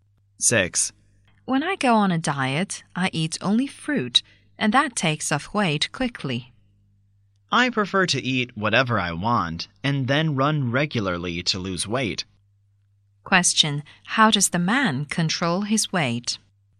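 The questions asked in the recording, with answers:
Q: How does the man control his weight?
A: By running regularly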